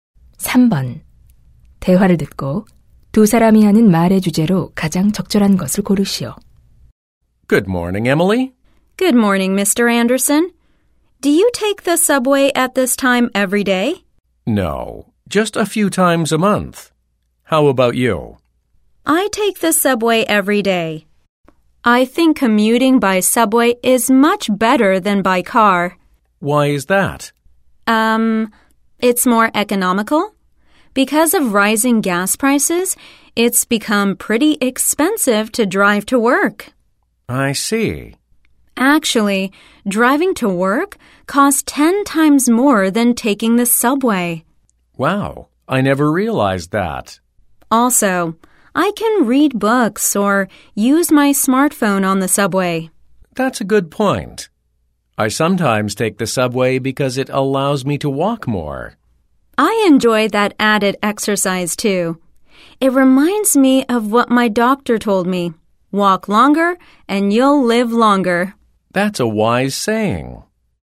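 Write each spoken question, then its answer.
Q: 대화를 듣고 두 사람이 하는 말의 주제로 가장 적절한 것을 고르시오.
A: 지하철 통근의 장점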